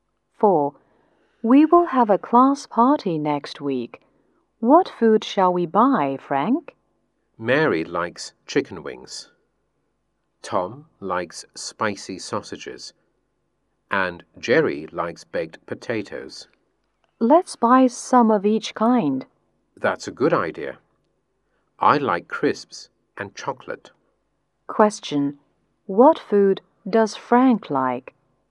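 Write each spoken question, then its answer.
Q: What food does Frank like?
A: Crisps and chocolate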